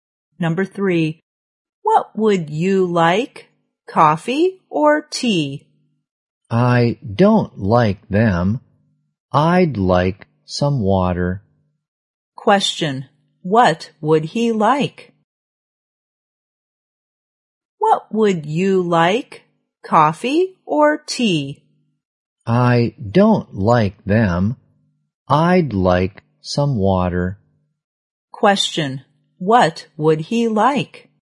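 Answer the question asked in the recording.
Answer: Some water.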